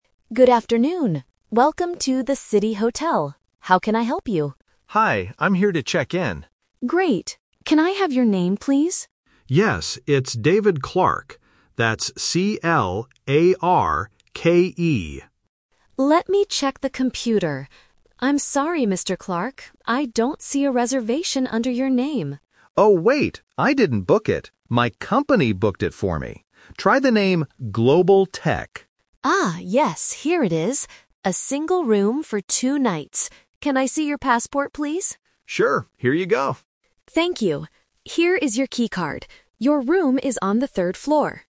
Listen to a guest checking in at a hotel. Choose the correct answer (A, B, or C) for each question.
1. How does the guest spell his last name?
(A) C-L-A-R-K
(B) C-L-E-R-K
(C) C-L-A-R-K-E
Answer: C-L-A-R-K-E

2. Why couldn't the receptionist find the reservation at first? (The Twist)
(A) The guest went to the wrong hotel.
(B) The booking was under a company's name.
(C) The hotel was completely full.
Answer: The booking was under a company's name.

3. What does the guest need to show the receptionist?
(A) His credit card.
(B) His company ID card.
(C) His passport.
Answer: His passport.

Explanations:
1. The guest clearly spells his last name letter by letter: "That's C-L-A-R-K-E." Trap: Option A is a trap because "Clark" is a very common spelling, but he specifically adds an "E" at the end. Option B sounds similar but is incorrect.
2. This is the Twist. The guest remembers that he didn't use his personal name. He says, "My company booked it for me. Try the name 'Global Tech'." Trap: Option A and Option C are common problems when checking into a hotel, but they are never mentioned in the audio.
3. After finding the reservation, the receptionist asks, "Can I see your passport, please?" and the guest gives it to her. Trap: Option B is a trap because the word "company" was mentioned earlier, but he didn't need to show a company ID. Option A is plausible for a hotel check-in but is not asked for in this conversation.

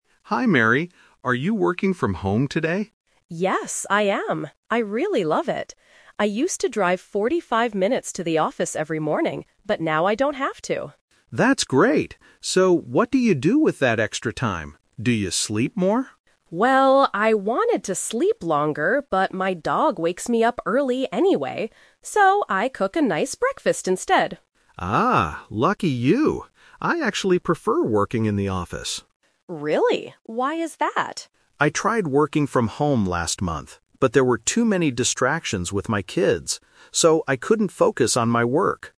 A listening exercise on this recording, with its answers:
Listen to the conversation and choose the correct answer (A, B, or C).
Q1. How much time did Mary use to spend driving to the office?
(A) 30 minutes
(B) 45 minutes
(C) 60 minutes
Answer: 45 minutes

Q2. What does Mary do with her extra time in the morning now?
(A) She sleeps longer.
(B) She cooks a nice breakfast.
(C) She walks her dog in the park.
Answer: She cooks a nice breakfast.

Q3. Why does Paul prefer working in the office?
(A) He can talk to his colleagues.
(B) He doesn't like cooking breakfast.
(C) His children distract him at home.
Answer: His children distract him at home.

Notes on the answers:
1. Mary clearly says, "I used to drive 45 minutes to the office every morning." Option A and C are not mentioned in the audio.
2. Mary says, "So, I cook a nice breakfast instead." Option A (sleeps longer) is a trap because she wanted to do it, but she couldn't because her dog wakes her up. Option C is a trap because she mentions her dog, but not walking it in the park.
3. Paul says, "there were too many distractions with my kids. So, I couldn't focus on my work." Option A is a plausible reason to like the office, but it is not mentioned. Option B is not the reason he gives.

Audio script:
Paul: Hi, Mary. Are you working from home today?
Mary: Yes, I am. I really love it. I used to drive 45 minutes to the office every morning, but now I don't have to.
Paul: That's great. So, what do you do with that extra time? Do you sleep more?
Mary: Well, I wanted to sleep longer, but my dog wakes me up early anyway. So, I cook a nice breakfast instead.
Paul: Ah, lucky you. I actually prefer working in the office.
Mary: Really? Why is that?
Paul: I tried working from home last month, but there were too many distractions with my kids. So, I couldn't focus on my work.

